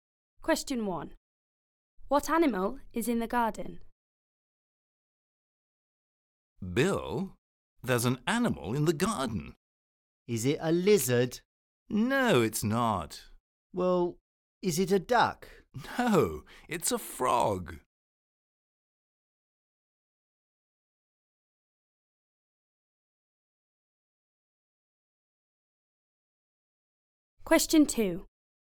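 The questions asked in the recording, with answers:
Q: What animal is in the garden?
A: a frog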